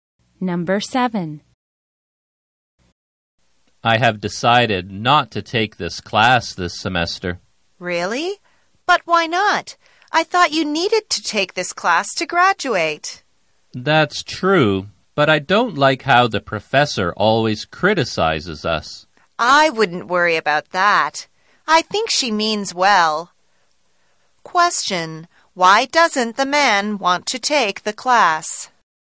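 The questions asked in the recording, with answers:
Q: Why doesn't the man want to take the class?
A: He doesn't like how the professor always criticizes the students.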